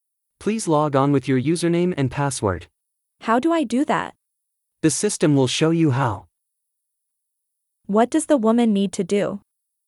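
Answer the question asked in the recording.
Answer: Log on with her username and password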